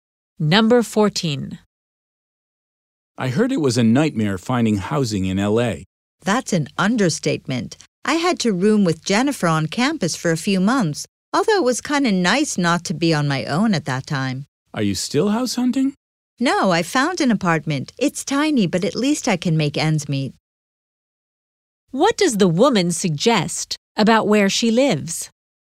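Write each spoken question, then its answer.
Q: What does the woman suggest about where she lives?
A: It's a tiny apartment but affordable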